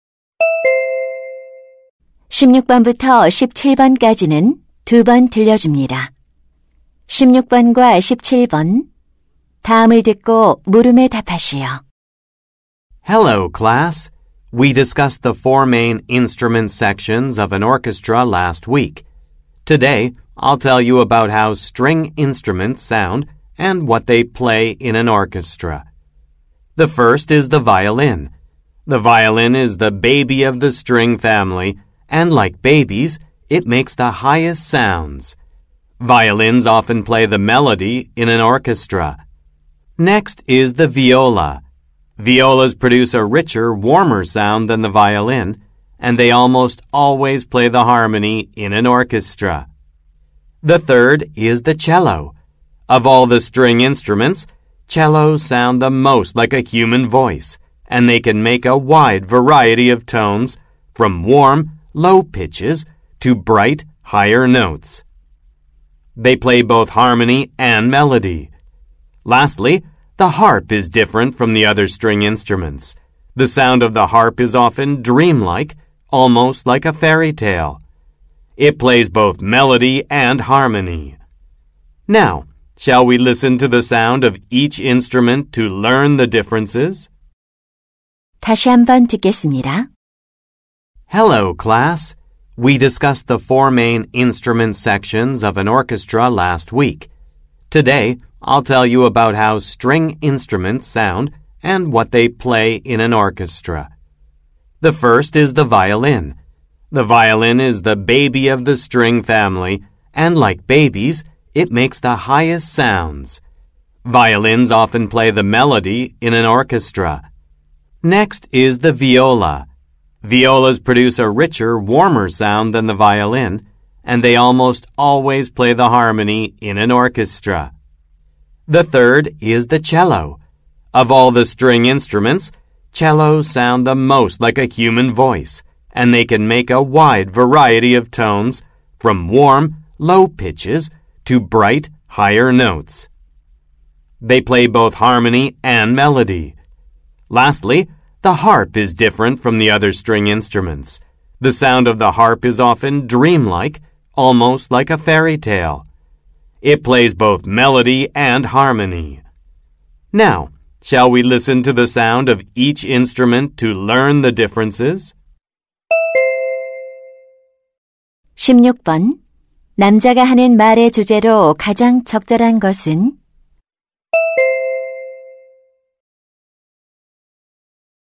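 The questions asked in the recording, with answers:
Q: 남자가 하는 말의 주제로 가장 적절한 것은?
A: 오케스트라 현악기들의 소리와 역할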